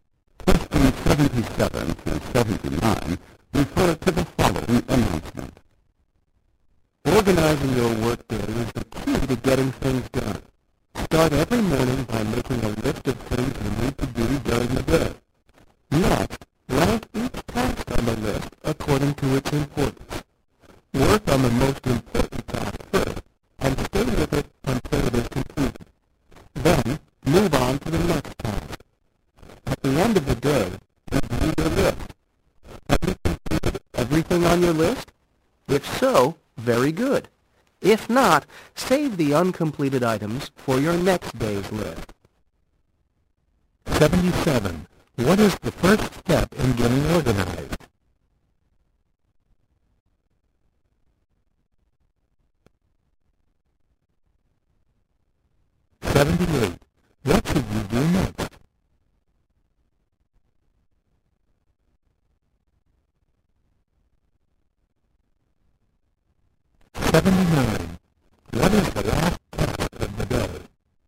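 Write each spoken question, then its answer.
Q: What is the first step in getting organized?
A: Make a list of things to do

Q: What should you do next?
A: Rank each task by importance

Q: What is the last task of the day?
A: Review the list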